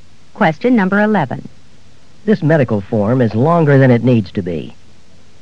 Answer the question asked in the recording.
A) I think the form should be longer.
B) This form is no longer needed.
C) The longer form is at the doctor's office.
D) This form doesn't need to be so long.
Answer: D) This form doesn't need to be so long.

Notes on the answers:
This medical form is longer than it needs to be.